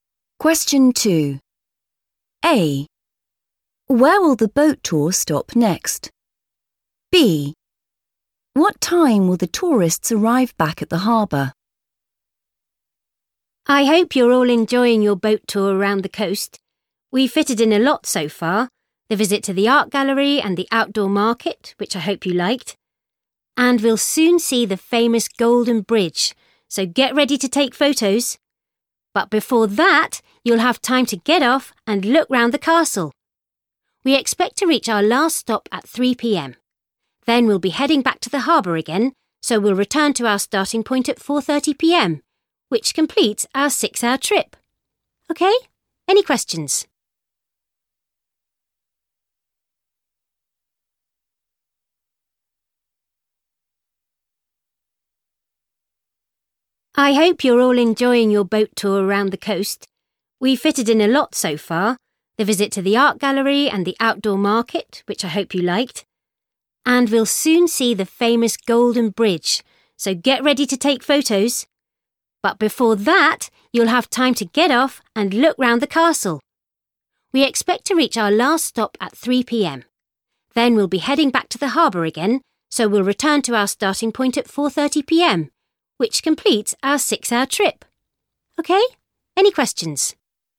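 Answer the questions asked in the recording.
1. the castle
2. 4:30 p.m.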